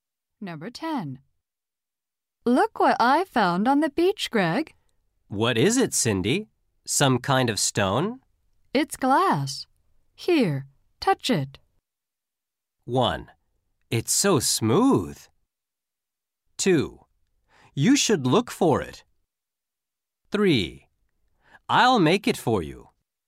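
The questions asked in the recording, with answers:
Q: It's glass. Here, touch it.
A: 1: It's so smooth.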